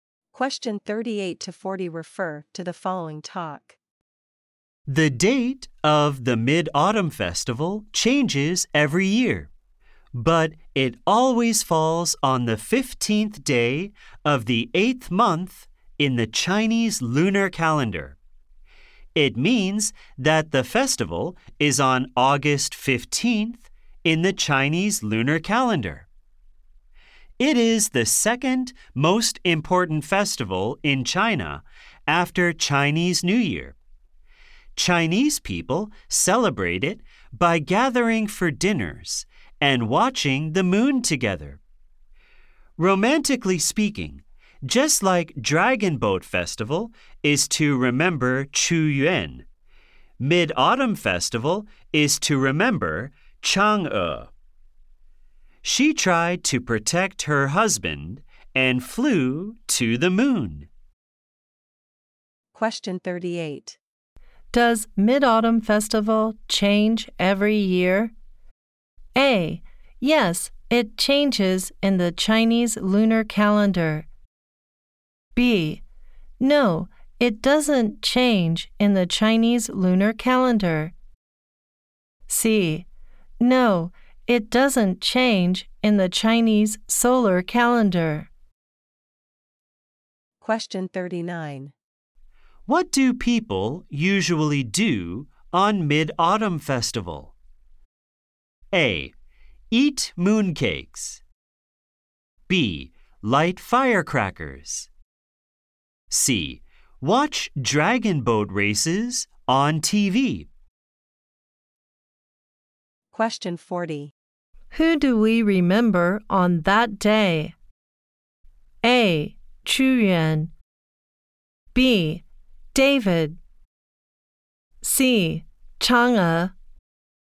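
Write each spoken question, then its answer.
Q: Does Mid-Autumn Festival change every year?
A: B: No, it doesn't change in the Chinese lunar calendar.

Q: Who do we remember on that day?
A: C: Chang'e.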